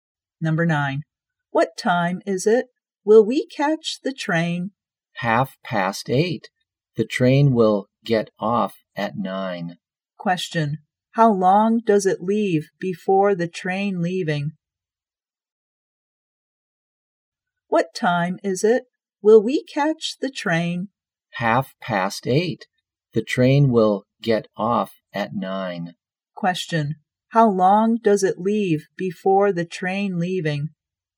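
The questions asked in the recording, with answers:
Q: How long does it leave before the train leaving?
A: 30 minutes.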